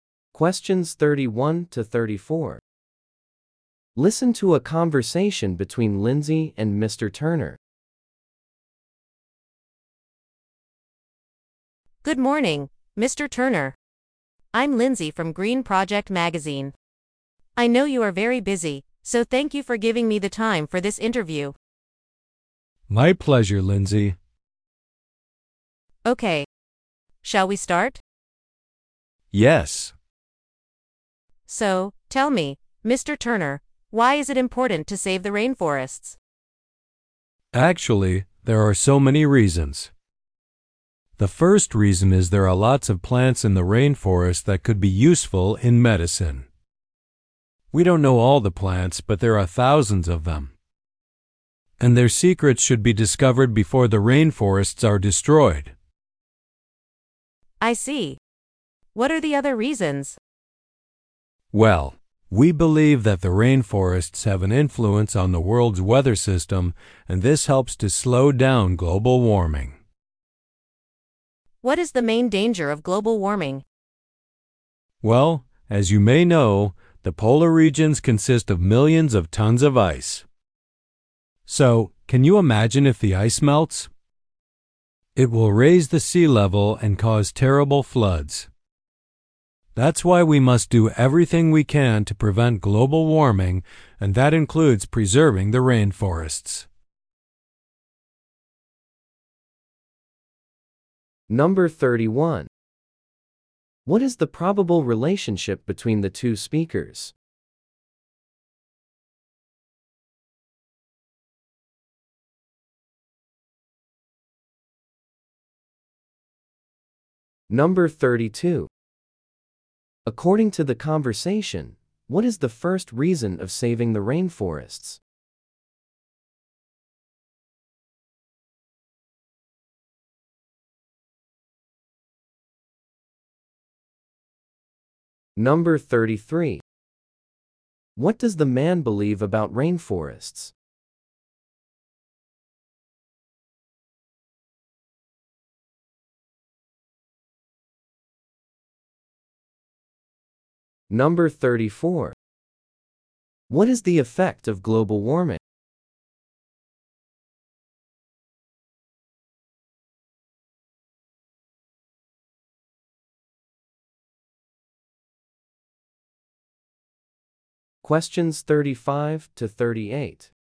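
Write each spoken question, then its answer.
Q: What is the probable relationship between the two speakers?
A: Magazine interviewer and interviewee

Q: According to the conversation, what is the first reason of saving the rainforests?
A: Rainforest plants could be useful in medicine

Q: What does the man believe about rainforests?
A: They influence the world's weather and help slow global warming

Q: What is the effect of global warming?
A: Polar ice melts, raising sea levels and causing floods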